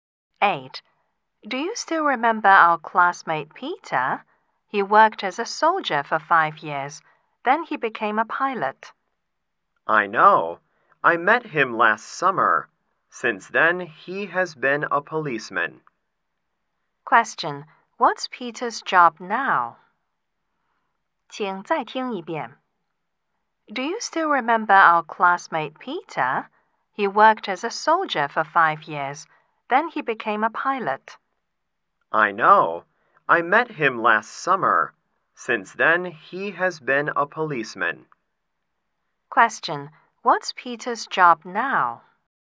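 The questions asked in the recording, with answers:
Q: What's Peter's job now?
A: A policeman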